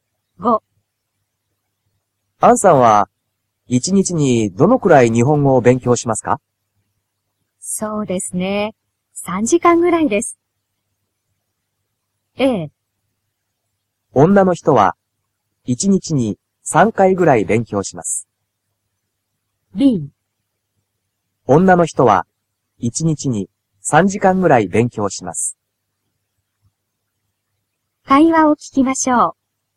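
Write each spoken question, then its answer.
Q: アンさんは、一日にどのくらい日本語を勉強しますか?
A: B: 女の人は、一日に3時間ぐらい勉強します。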